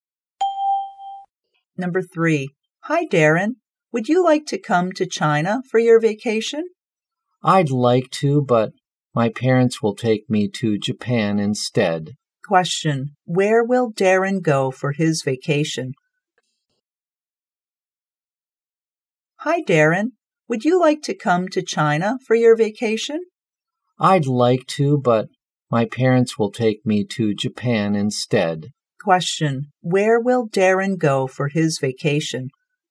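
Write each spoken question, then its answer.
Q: Question. Where will Darren go for his vacation?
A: Japan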